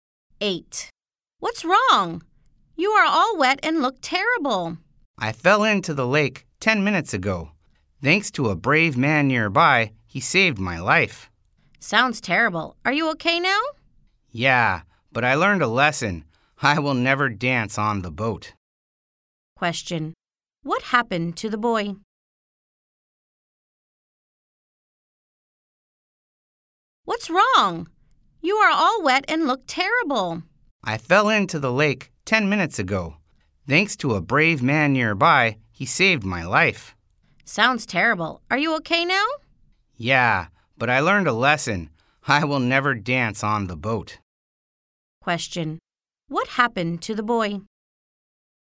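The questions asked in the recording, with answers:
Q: What happened to the boy?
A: He fell into the lake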